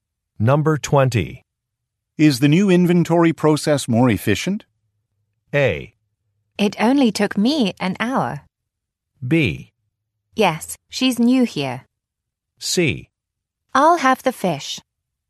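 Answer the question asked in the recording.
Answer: A: It only took me an hour.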